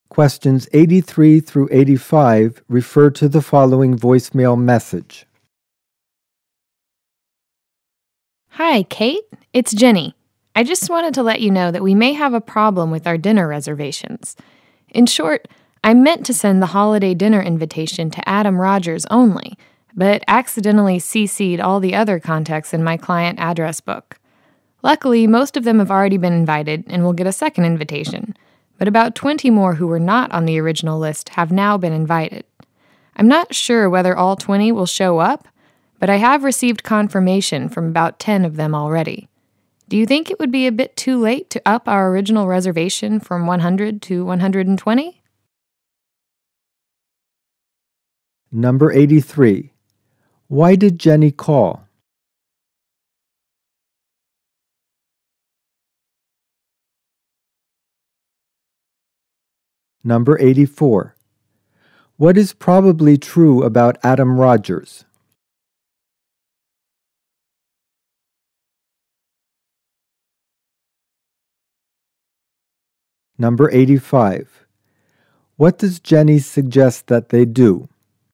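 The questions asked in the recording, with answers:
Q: Why did Jenny call?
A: To report a problem with the dinner reservations after too many people were invited

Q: What does Jenny suggest that they do?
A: Increase the reservation from 100 to 120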